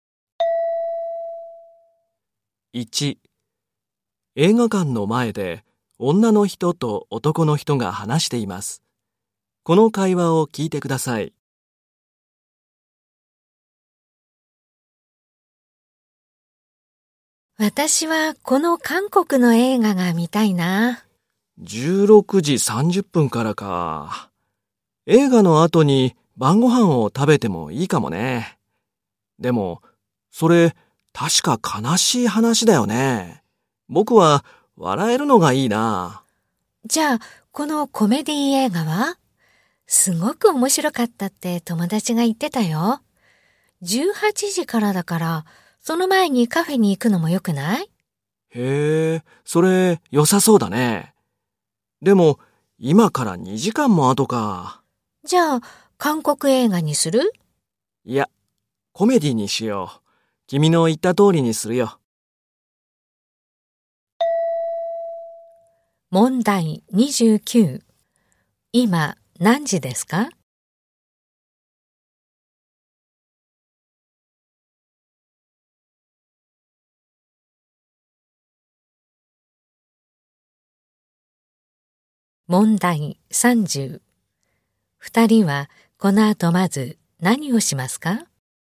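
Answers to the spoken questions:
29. 16時
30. カフェに行く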